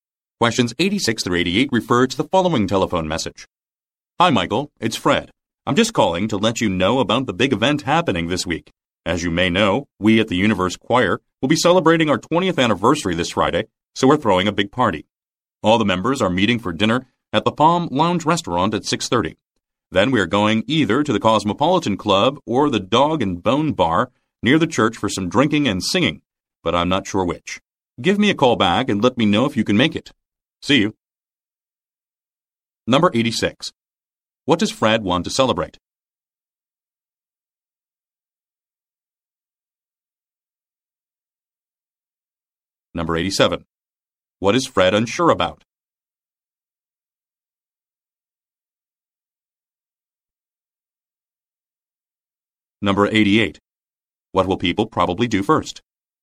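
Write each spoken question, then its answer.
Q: What does Fred want to celebrate?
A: The choir's 20th anniversary

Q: What is Fred unsure about?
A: Which place they will go to for drinking and singing after dinner

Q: What will people probably do first?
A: Have dinner at the Palm Lounge Restaurant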